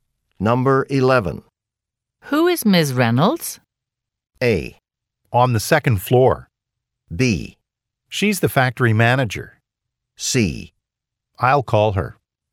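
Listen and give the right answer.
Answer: B: She's the factory manager.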